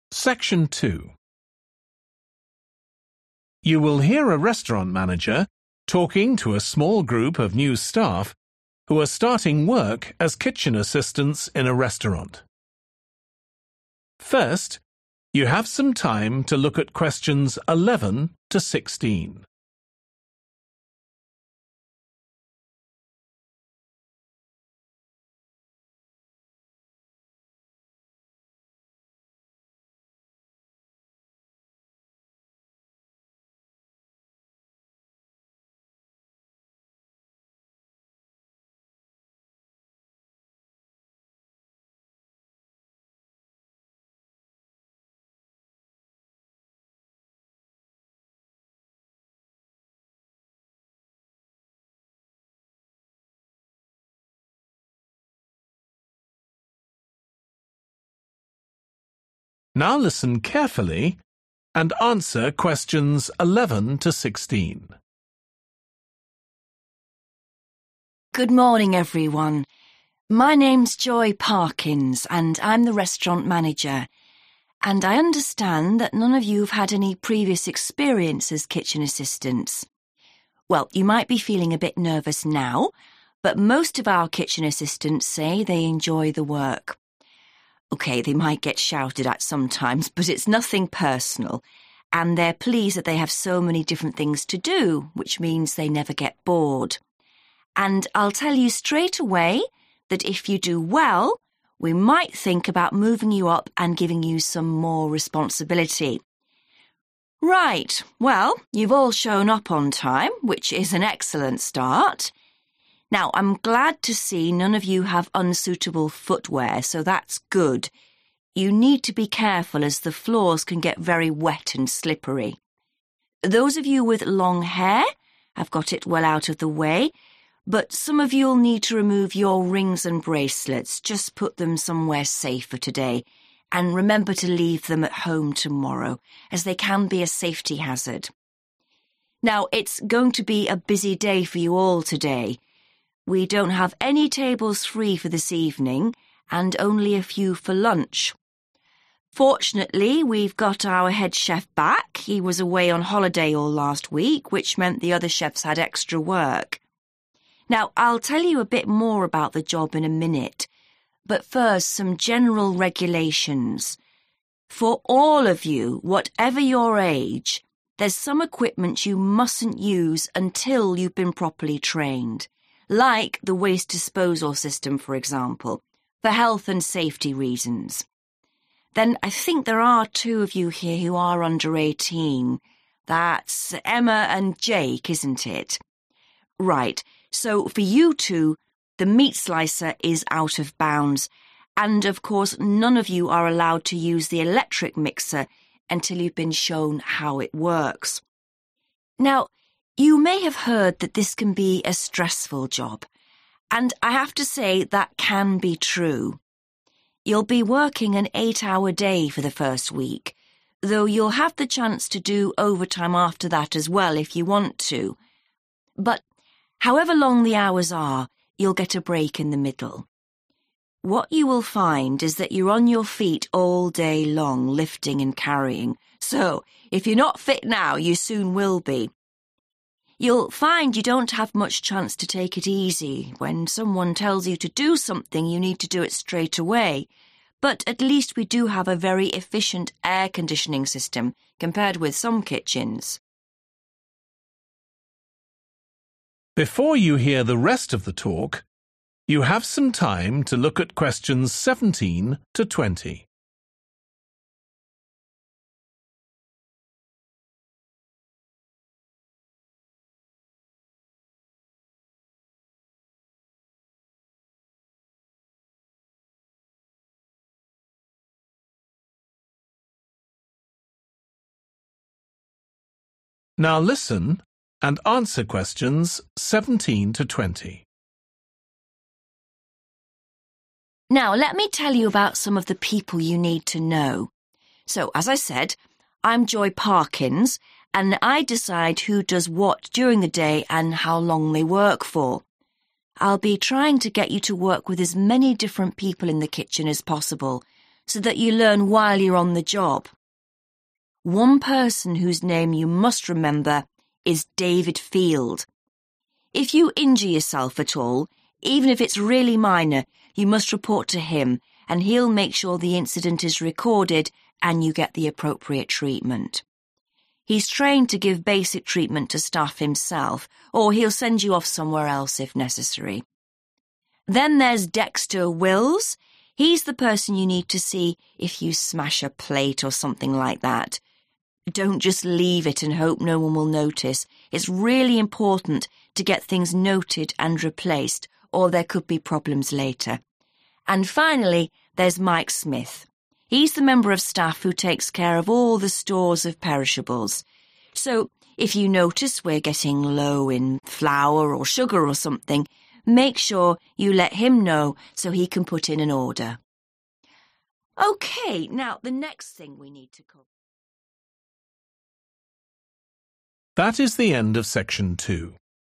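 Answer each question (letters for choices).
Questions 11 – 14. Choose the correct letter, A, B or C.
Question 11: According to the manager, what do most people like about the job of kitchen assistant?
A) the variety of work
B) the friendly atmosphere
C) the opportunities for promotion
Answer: A

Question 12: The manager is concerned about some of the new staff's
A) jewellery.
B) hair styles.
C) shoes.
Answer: A

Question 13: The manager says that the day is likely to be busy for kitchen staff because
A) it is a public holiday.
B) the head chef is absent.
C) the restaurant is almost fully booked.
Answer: C

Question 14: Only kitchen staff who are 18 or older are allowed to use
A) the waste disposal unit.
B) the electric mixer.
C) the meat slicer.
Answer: C

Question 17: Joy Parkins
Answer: timetables

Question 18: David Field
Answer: first aid

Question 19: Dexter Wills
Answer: breakages

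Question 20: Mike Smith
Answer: food stocks

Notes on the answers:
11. OK, they might get shouted at sometimes, but it's nothing personal, and they're pleased that they have so many different things to do, which means they never get bored (họ hài lòng vì họ có rất nhiều việc khác nhau để làm, điều đó có nghĩa là họ không bao giờ cảm thấy buồn chán)
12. Those of you with long hair have got it well out of the way, but some of you'll need to remove your rings and bracelets – just put them somewhere safe for today, and remember to leave them at home tomorrow, as they can be a safety hazard. (nhưng một số bạn sẽ cần tháo nhẫn và vòng tay của mình – chỉ cần đặt chúng ở nơi an toàn trong ngày hôm nay và nhớ để chúng ở nhà vào ngày mai, vì chúng có thể gây nguy hiểm.)
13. Now it's going to be a busy day for you all today – we don't have any tables free for this evening, and only a few for lunch (Hôm nay sẽ là một ngày bận rộn đối với tất cả các bạn – chúng tôi không có bàn nào trống cho buổi tối hôm nay và chỉ có một vài bàn cho bữa trưa)
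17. I'm Joy Parkins and I decide who does what during the day and how long they work for. (Vì vậy, như tôi đã nói, tôi là Joy Parkins và tôi quyết định ai sẽ làm gì trong ngày và họ sẽ làm việc trong bao lâu).
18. One person whose name you must remember is David Field. If you injure yourself at all, even if it's really minor, you must report to him and he'll make sure the incident is recorded and you get the appropriate treatment.
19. Then there's Dexter Wills – he's the person you need to see if you smash a plate or something like that. (Sau đó là Dexter Wills – anh ấy là người bạn cần gặp nếu bạn làm vỡ đĩa hoặc thứ gì đó tương tự)
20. And finally, there's Mike Smith. He's the member of staff who takes care of all the stores of perishables, so if you notice we're getting low in flour or sugar or something, make sure you let him know so he can put in an order.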